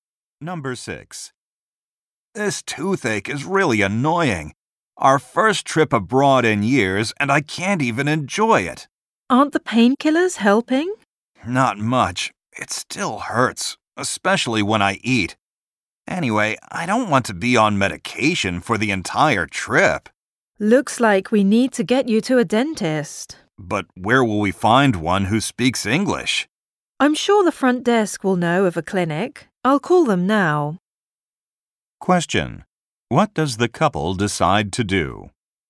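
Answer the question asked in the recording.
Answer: Ask the front desk about a clinic to find a dentist.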